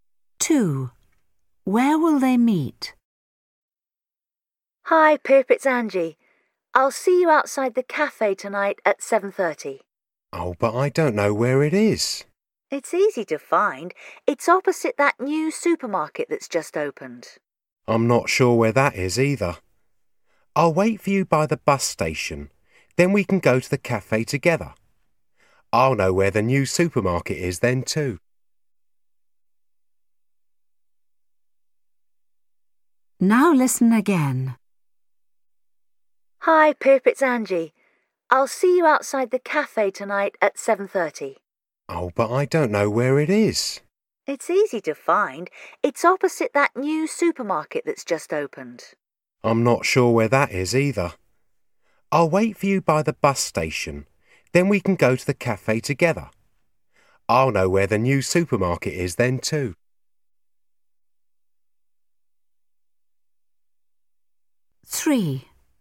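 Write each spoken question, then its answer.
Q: Where will they meet?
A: by the bus station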